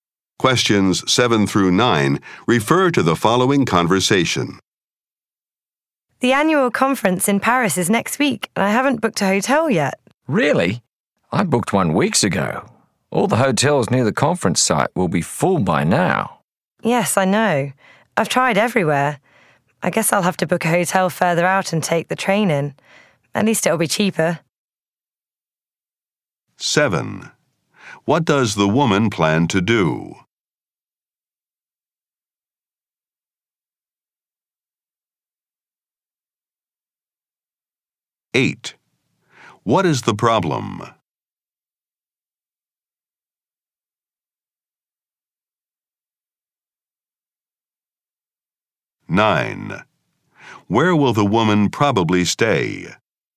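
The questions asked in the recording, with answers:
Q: What is the problem?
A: The hotels near the conference site are full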